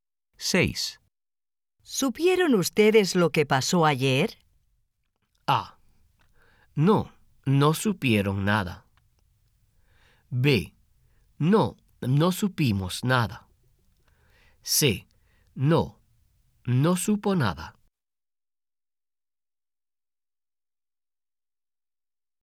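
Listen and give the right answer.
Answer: B: No, no supimos nada.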